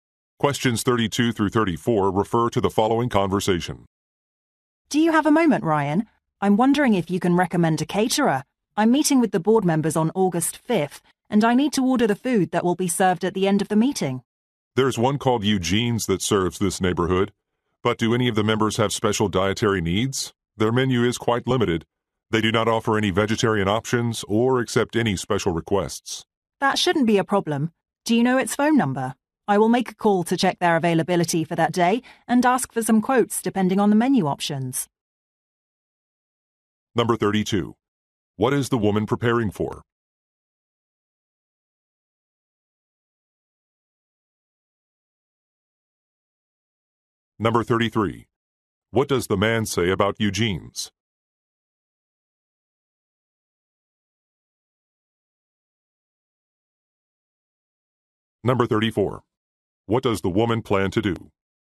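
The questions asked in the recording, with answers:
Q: What is the woman preparing for?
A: A board meeting on August 5th

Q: What does the man say about Eugene's?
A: Its menu is limited, with no vegetarian options or special requests

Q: What does the woman plan to do?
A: Call the caterer to check availability and ask for quotes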